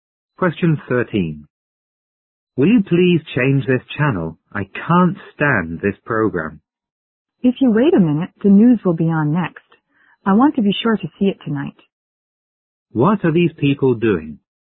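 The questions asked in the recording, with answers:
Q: What are these people doing?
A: Watching TV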